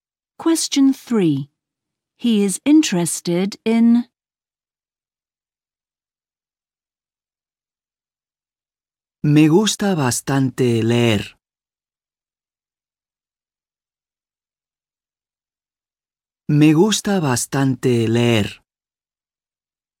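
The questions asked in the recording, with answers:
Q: He is interested in.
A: reading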